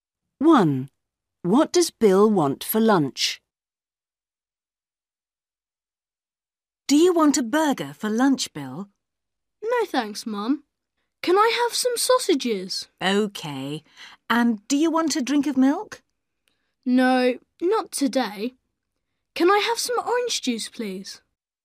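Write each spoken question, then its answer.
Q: What does Bill want for lunch?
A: sausages and orange juice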